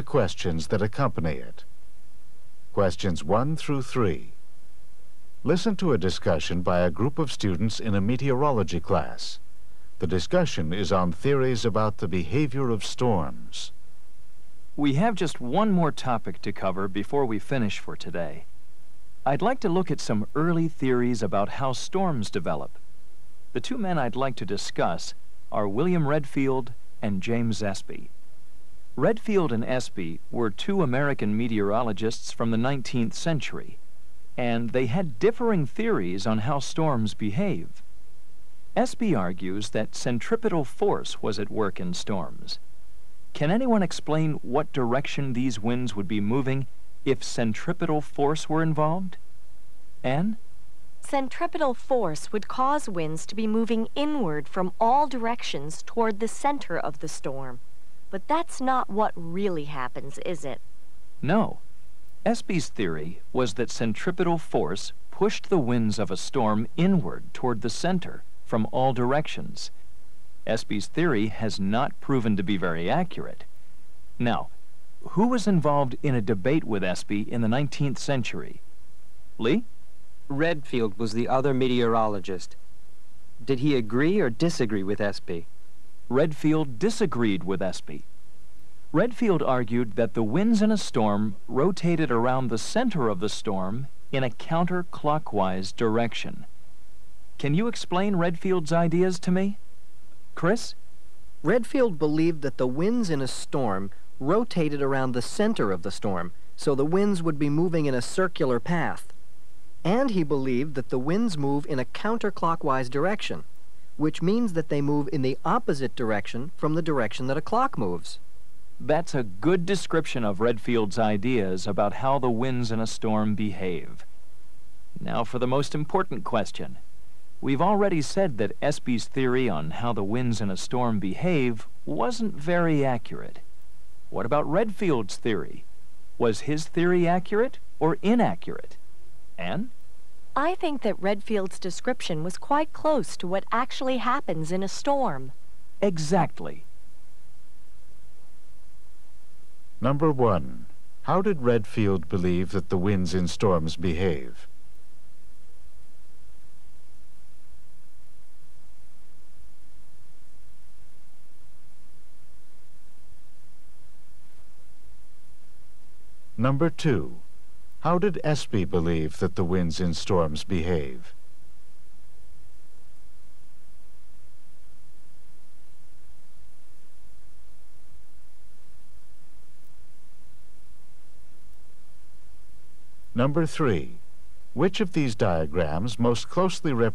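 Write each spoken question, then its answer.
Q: how did Redfield believe that the winds in storms behave?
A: They rotated counterclockwise around the center

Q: how did Espy believe that the winds in storms behave?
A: They moved inward toward the center from all directions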